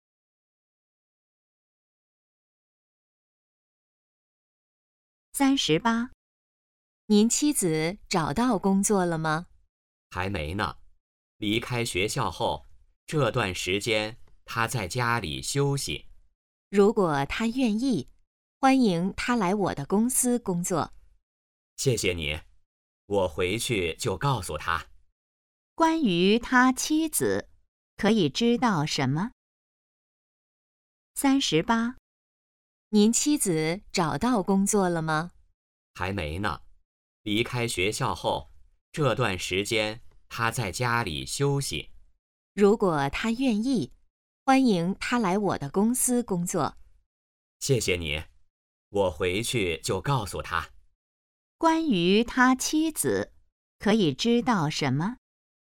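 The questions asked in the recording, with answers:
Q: 关于他妻子,可以知道什么?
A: 还没找到工作,在家休息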